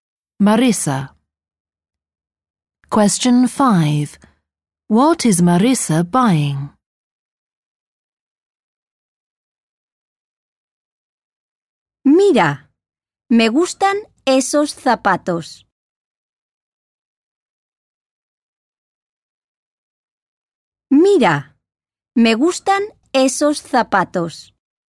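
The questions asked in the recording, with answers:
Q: What is Marisa buying?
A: Shoes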